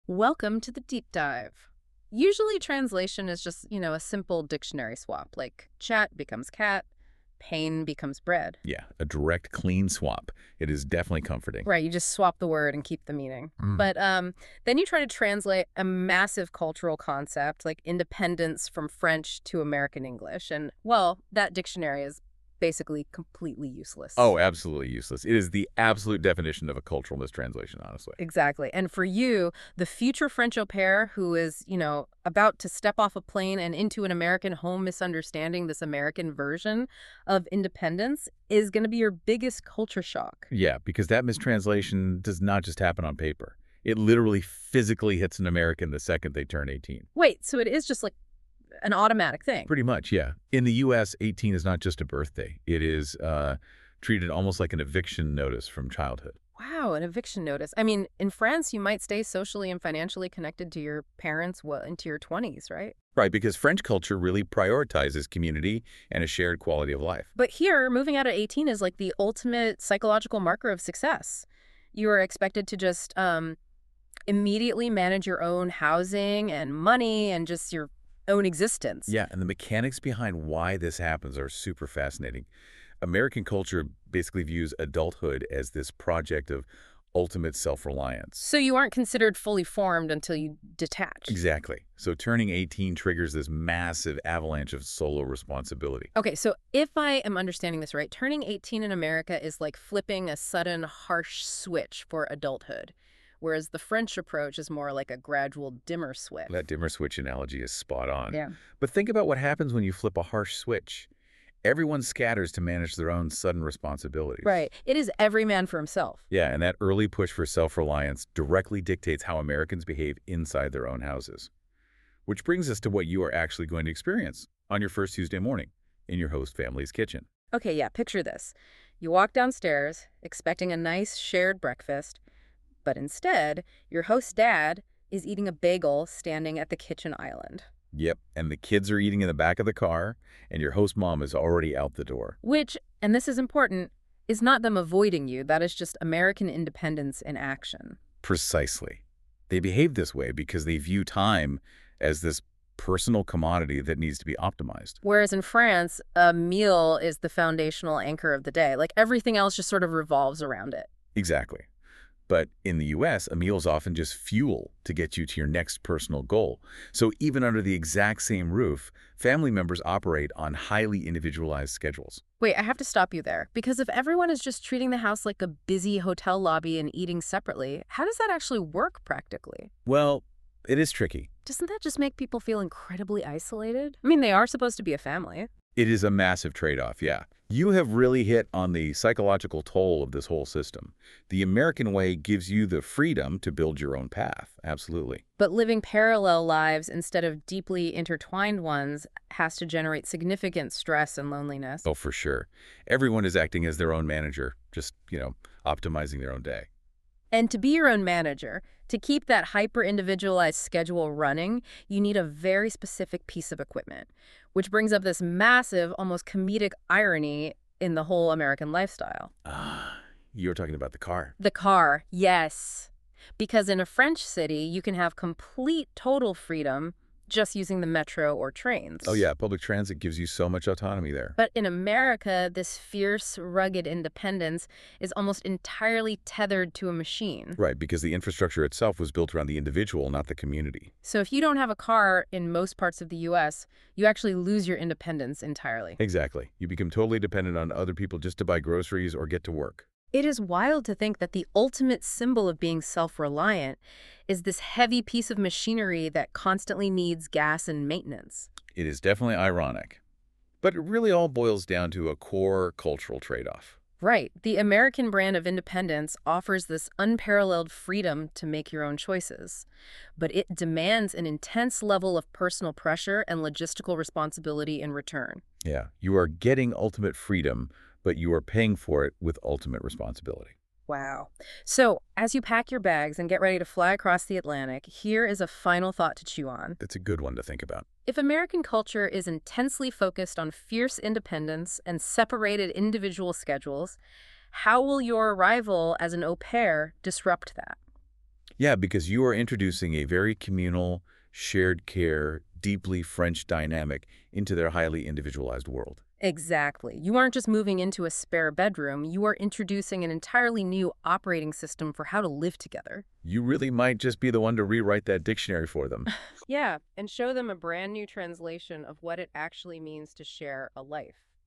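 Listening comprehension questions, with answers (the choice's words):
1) How is independence often perceived in the United States?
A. As unnecessary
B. As something developed early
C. As only financial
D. As only emotional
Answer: As something developed early

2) How can independence in France sometimes differ?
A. It is always earlier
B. It is not valued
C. It may develop later, especially financially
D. It is identical to the U.S.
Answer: It may develop later, especially financially

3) What is one example of independence in the U.S.?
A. Living with parents until 30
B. Relying on family for everything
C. Managing your own schedule and responsibilities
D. Avoiding work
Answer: Managing your own schedule and responsibilities

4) Why can misunderstandings happen between au pairs and host families?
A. Language only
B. Food differences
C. Different cultural expectations of independence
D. Weather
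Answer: Different cultural expectations of independence

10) What is the main message of the podcast?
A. Cultures are identical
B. Independence has different meanings across cultures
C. Independence is not important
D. Only Americans are independent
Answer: Independence has different meanings across cultures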